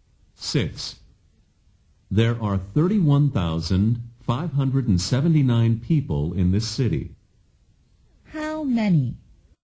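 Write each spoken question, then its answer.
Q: How many?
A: 31,579 people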